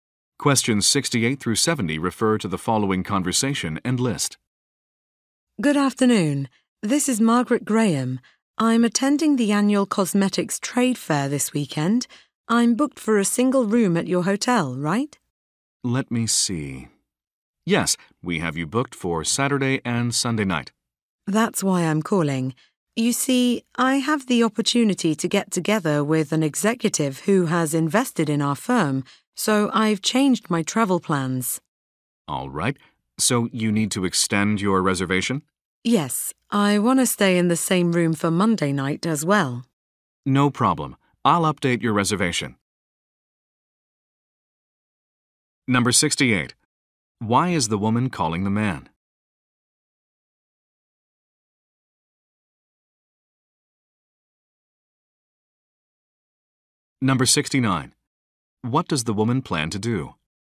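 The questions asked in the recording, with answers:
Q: Why is the woman calling the man?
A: To extend her reservation

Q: What does the woman plan to do?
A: Meet with an executive who invested in her firm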